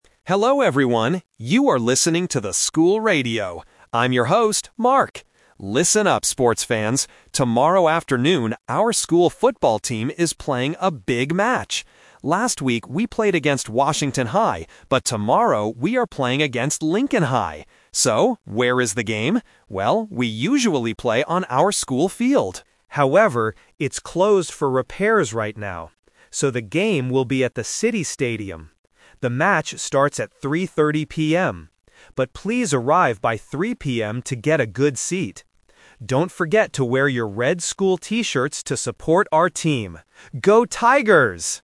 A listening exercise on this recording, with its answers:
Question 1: Which school is the football team playing against tomorrow?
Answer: Lincoln High

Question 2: Where is the football match going to be?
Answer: At the City Stadium

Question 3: What time does the football match start?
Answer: At 3:30 PM

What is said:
Mark: Hello everyone, you are listening to the School Radio! I'm your host, Mark. Listen up, sports fans! Tomorrow afternoon, our school football team is playing a big match. Last week we played against Washington High, but tomorrow we are playing against Lincoln High. So, where is the game? Well, we usually play on our school field. However, it's closed for repairs right now. So, the game will be at the City Stadium. But please arrive by 3:00 PM to get a good seat. Don't forget to wear your red school T-shirts to support our team. Go Tigers!